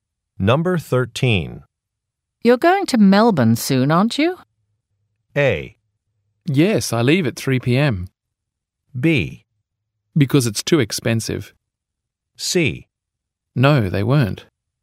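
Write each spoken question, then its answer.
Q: You're going to Melbourne soon, aren't you?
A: A: Yes, I leave at 3 p.m.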